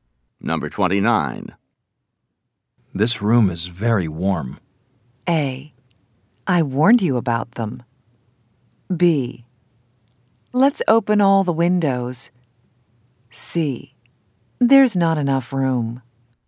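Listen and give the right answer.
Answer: B: Let's open all the windows.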